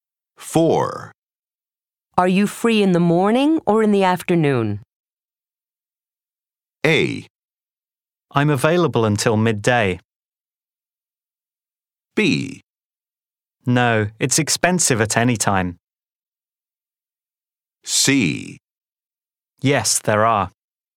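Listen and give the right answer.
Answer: A: I'm available until midday.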